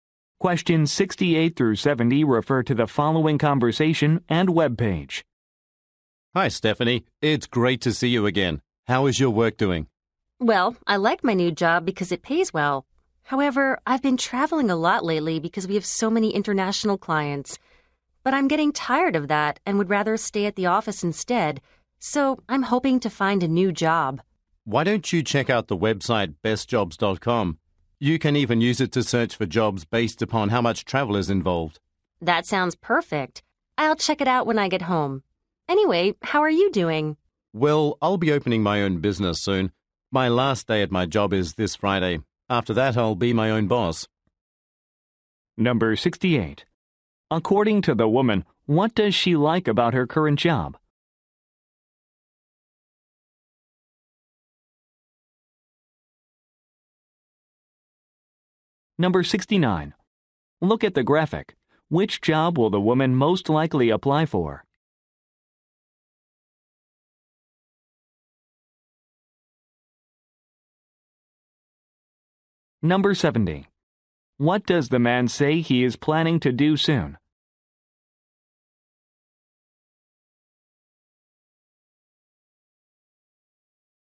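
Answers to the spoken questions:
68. It pays well
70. Open his own business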